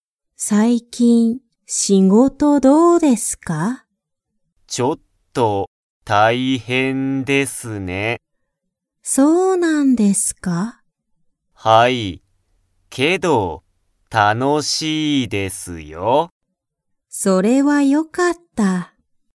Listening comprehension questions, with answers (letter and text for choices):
Comprehension Quiz (Skip if you don't understand the conversation yet)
佐藤(さとう)さんは仕事(しごと)が楽(たの)しいですか?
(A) はい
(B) いいえ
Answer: (A) はい

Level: Level 1